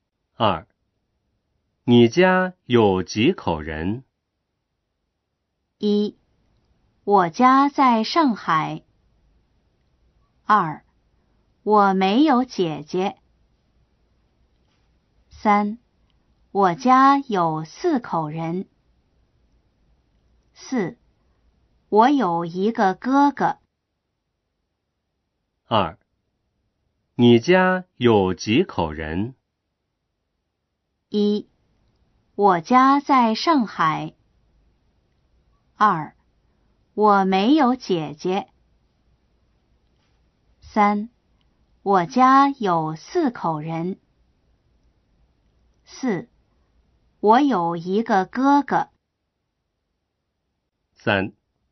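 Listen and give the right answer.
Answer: 3: 我家有四口人。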